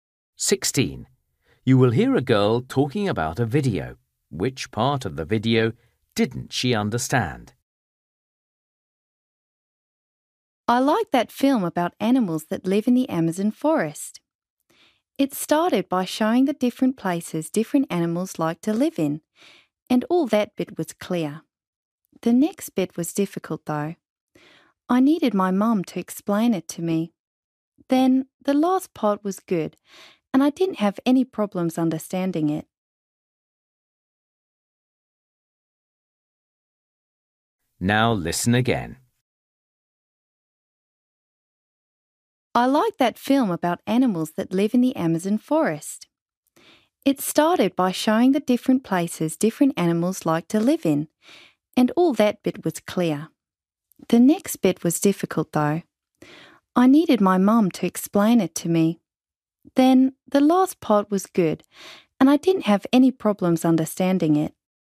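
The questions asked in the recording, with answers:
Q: Which part of the video didn't she understand?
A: the middle part (after the section on where animals live)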